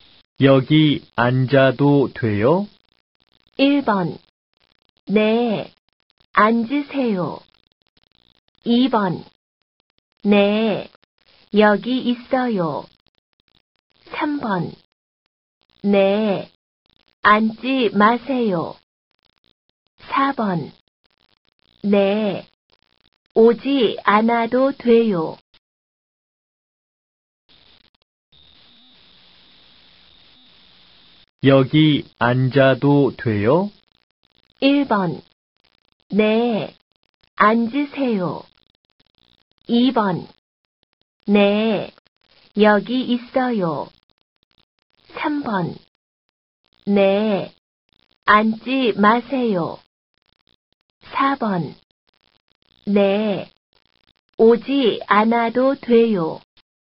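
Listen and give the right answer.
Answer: 1: 네, 앉으세요.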